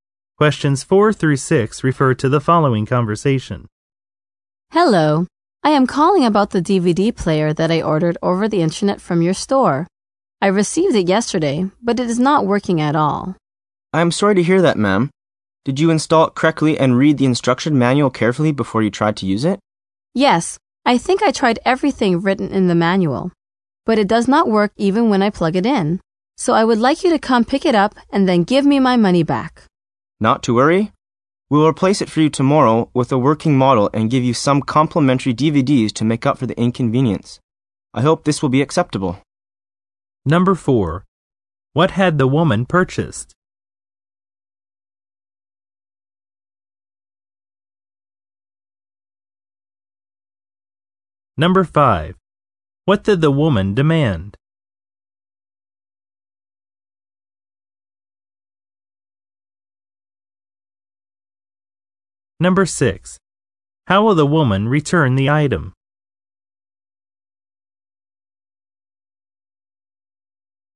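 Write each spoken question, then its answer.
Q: What had the woman purchased?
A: A DVD player

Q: What did the woman demand?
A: That the store pick it up and give her money back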